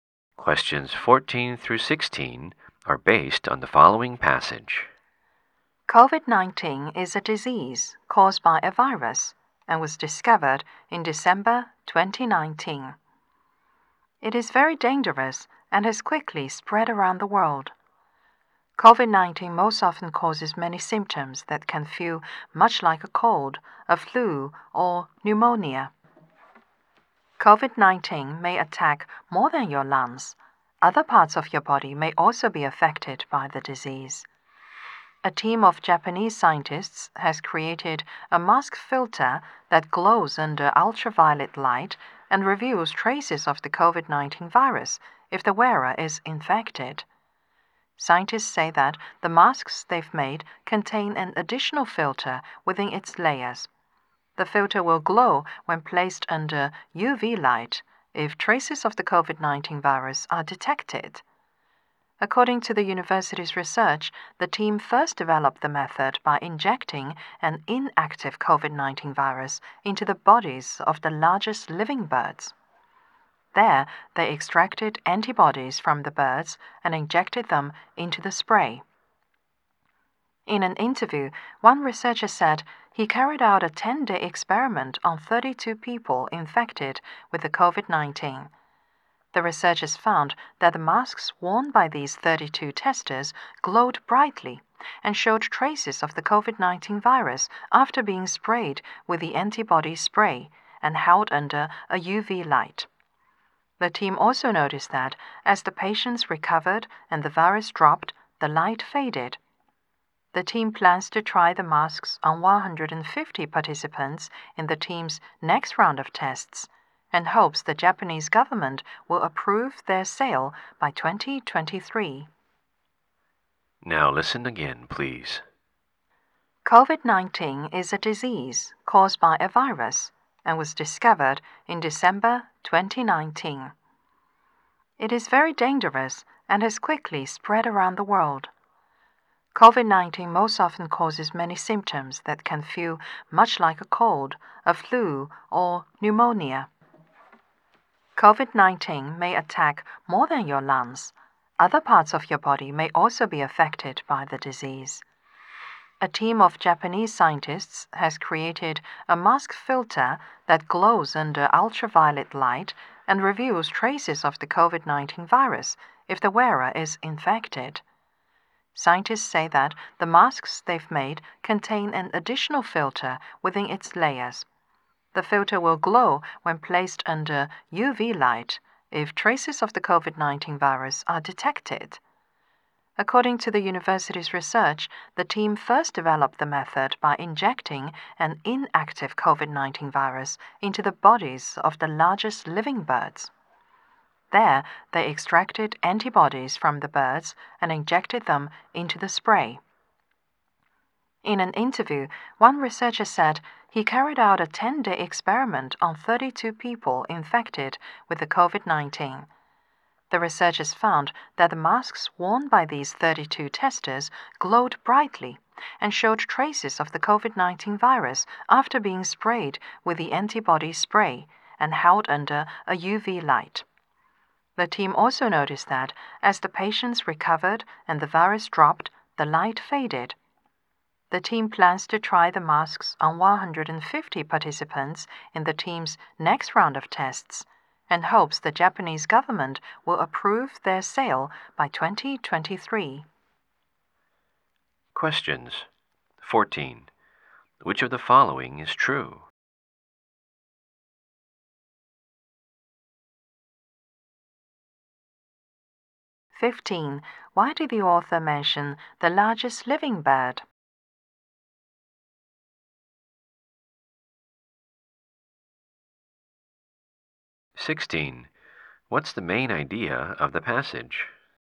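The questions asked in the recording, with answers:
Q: Why did the author mention the largest living bird?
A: Antibodies for the spray were taken from these birds

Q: What's the main idea of the passage?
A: A mask filter that glows to show COVID-19 infection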